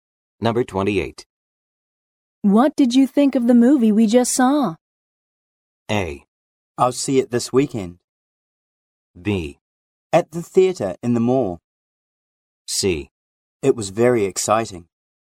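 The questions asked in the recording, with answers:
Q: What did you think of the movie we just saw?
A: C: It was very exciting.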